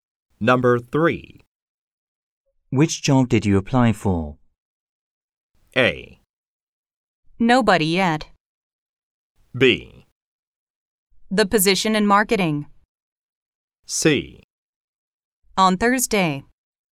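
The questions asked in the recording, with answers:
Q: Which job did you apply for?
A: B: The position in marketing.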